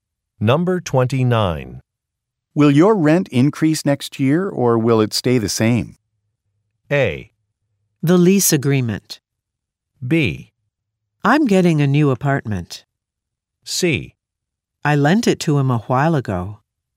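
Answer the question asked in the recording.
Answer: B: I'm getting a new apartment.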